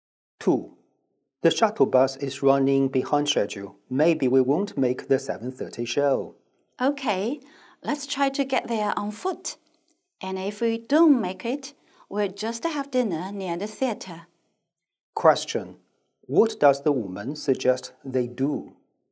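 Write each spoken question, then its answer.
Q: What does the woman suggest they do?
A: Walk to the theater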